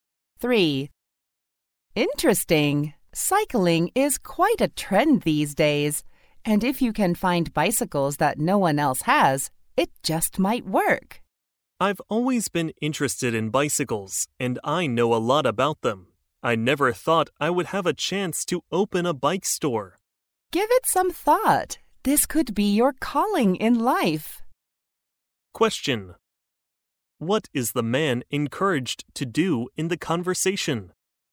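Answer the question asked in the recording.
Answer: Open a bike store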